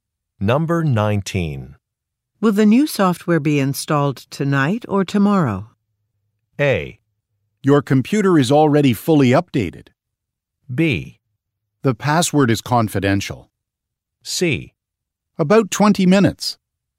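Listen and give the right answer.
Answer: A: Your computer is already fully updated.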